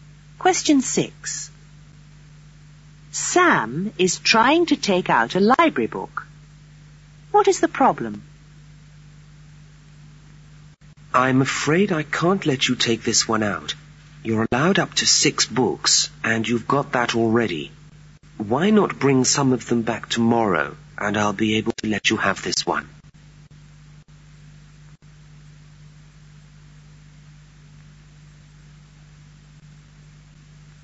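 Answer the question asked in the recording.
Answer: He already has the maximum of 6 books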